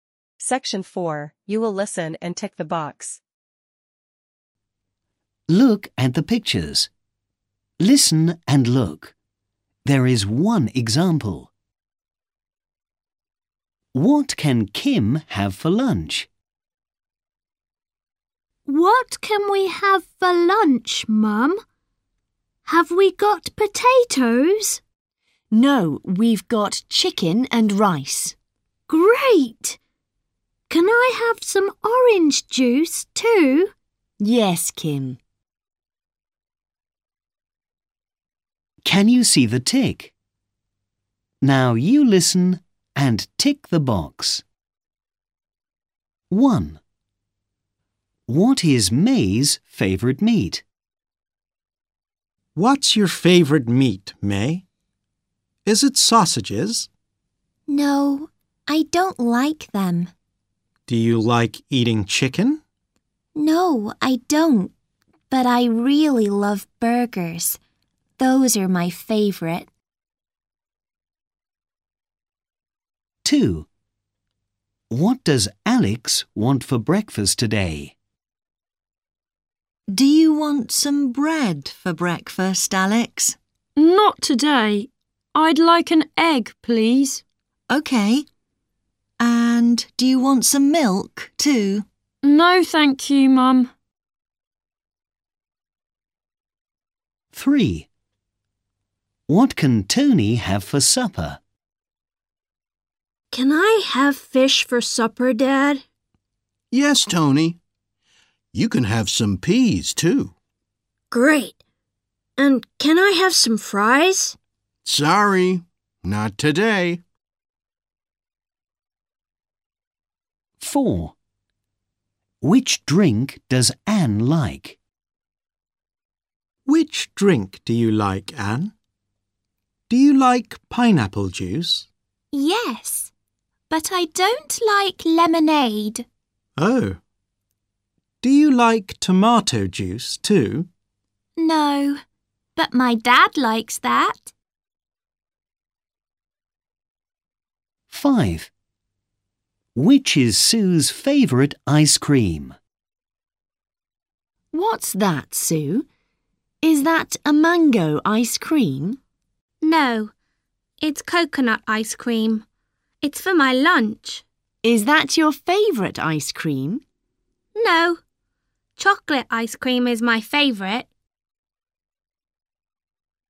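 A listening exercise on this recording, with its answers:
You will listen and tick the box.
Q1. What is May's favourite meat?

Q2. What does Alex want for breakfast today?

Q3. What can Tony have for Supper?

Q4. Which drink does Ann like?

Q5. Which is Sue's favourite ice cream?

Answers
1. burgers
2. an egg
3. fish and peas
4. pineapple juice
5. chocolate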